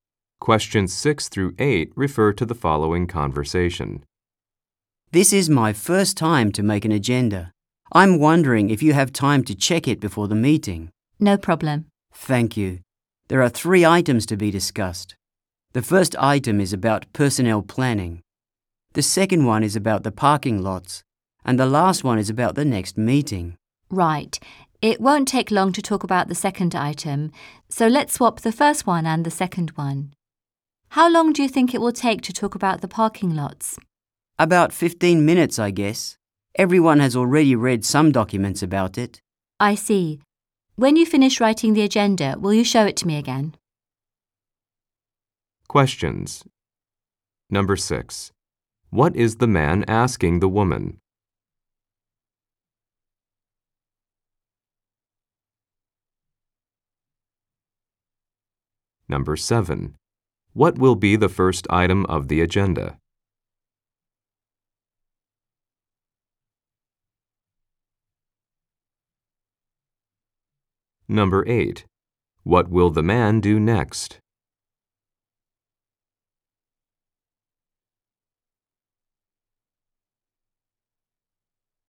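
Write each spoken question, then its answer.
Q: What will be the first item of the agenda?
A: The parking lots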